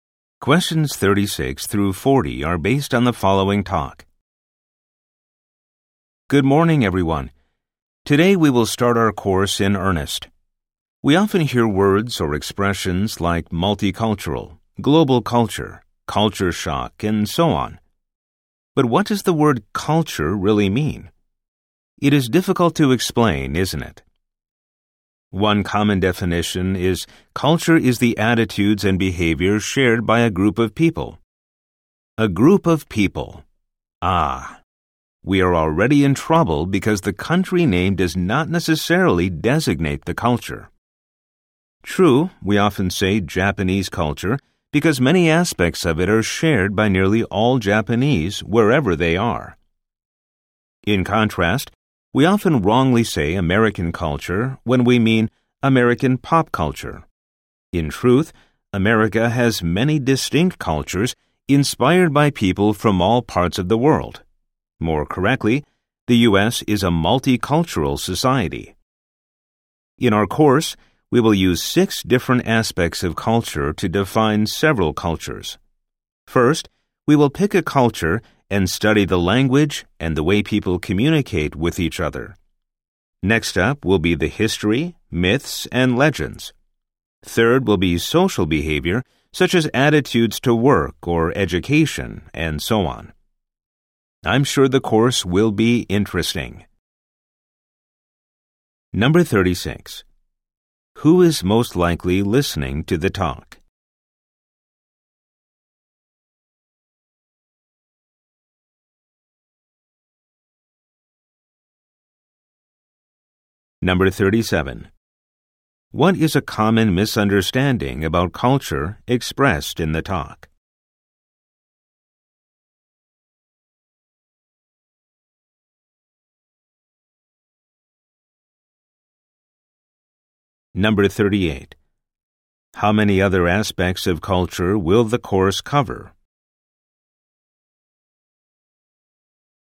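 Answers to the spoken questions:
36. Students in a course on culture
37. That a country's name always stands for one culture (for example, saying "American culture")
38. Three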